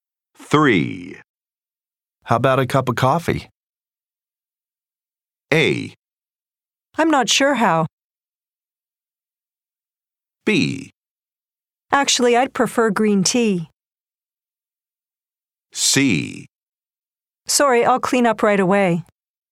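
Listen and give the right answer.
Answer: B: Actually, I'd prefer green tea.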